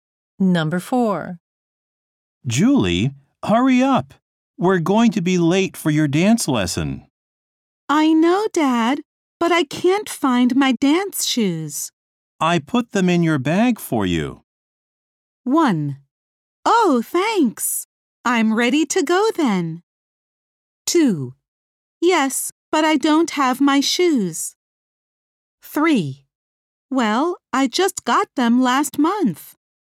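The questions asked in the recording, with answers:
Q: I put them in your bag for you.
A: 1: Oh, thanks. I'm ready to go then.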